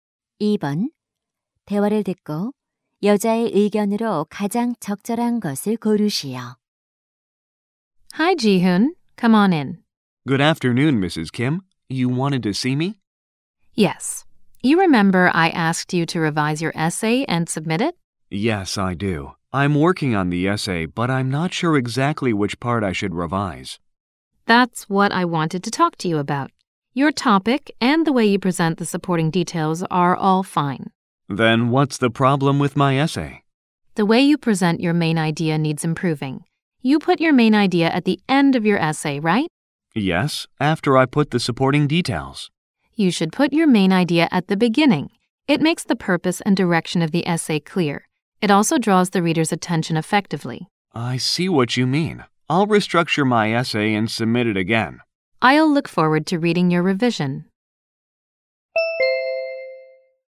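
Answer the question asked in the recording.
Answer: 에세이의 주제문은 글의 앞부분에 두어야 한다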